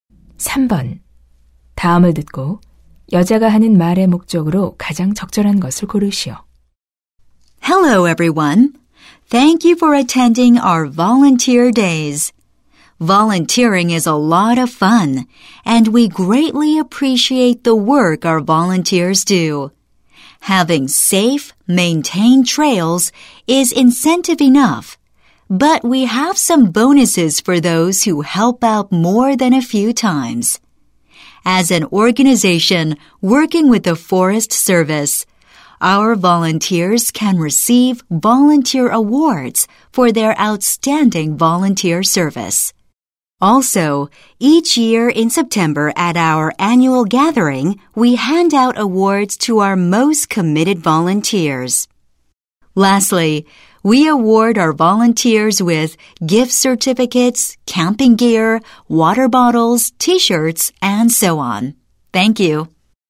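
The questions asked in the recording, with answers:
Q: 다음을 듣고 여자가 하는 말의 목적으로 가장 적절한 것을 고르시오.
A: 자원봉사자에게 주는 보상을 안내하려고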